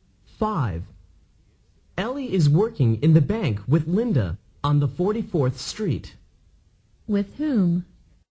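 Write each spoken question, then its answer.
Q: With whom?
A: With Linda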